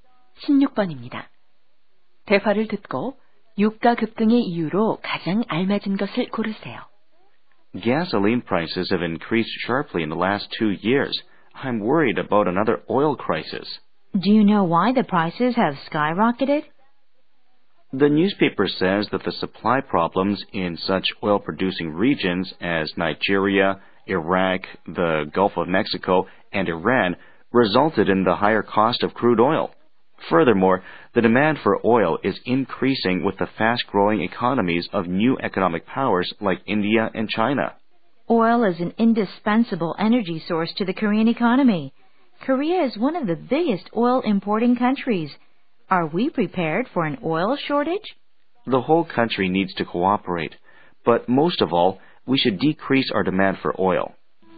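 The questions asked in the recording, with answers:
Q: 대화를 듣고 유가 급등의 이유로 가장 알맞은 것을 고르세요.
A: 산유 지역의 공급 문제와 수요 증가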